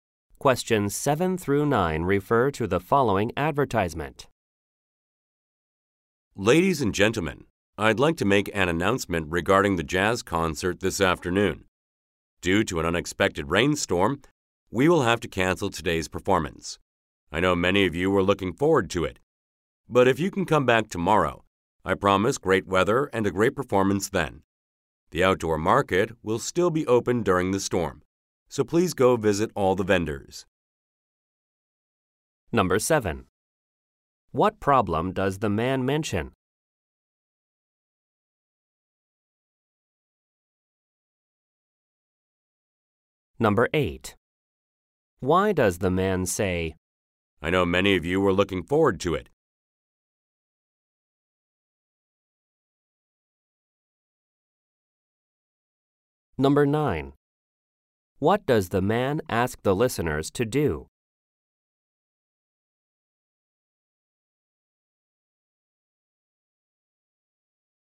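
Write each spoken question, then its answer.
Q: What problem does the man mention?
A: A rainstorm means the concert is canceled

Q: What does the man ask the listeners to do?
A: Visit the vendors at the outdoor market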